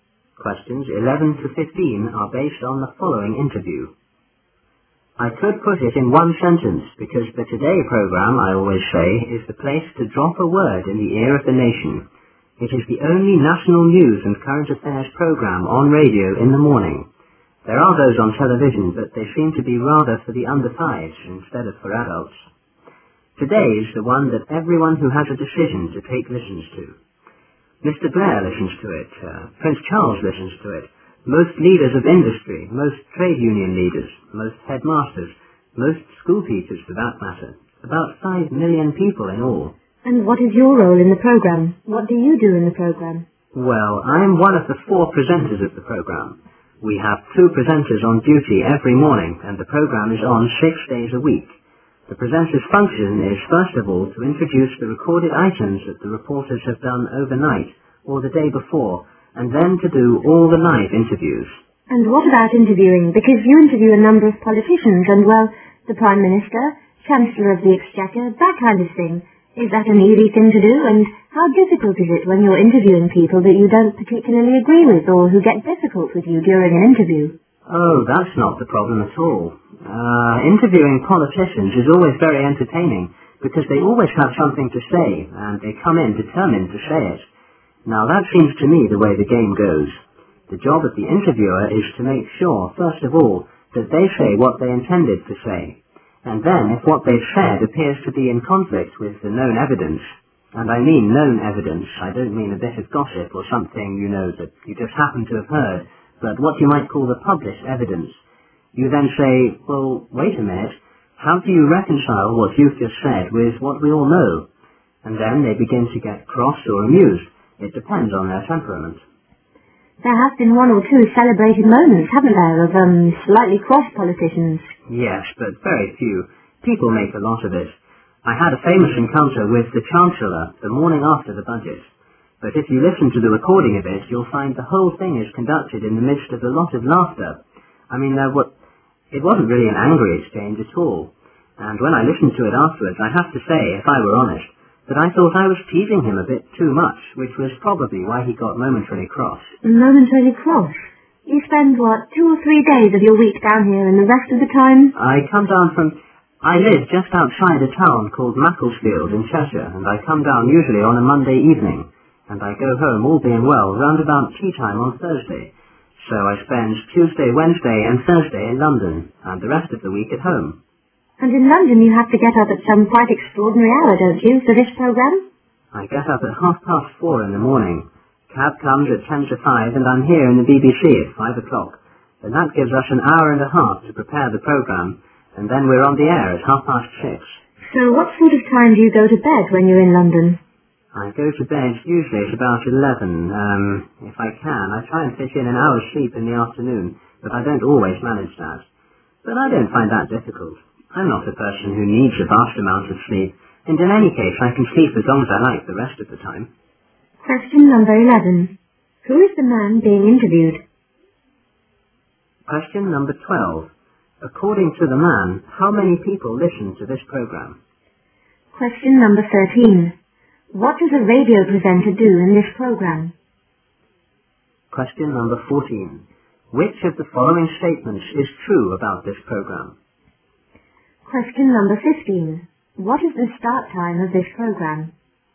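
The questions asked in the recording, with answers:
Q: Who is the man being interviewed?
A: One of the presenters of the BBC radio Today programme

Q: According to the man, how many people listen to this program?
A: About 5 million

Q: What does a radio presenter do in this program?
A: Introduces the reporters' recorded items and does all the live interviews

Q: What is the start time of this program?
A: 6:30 in the morning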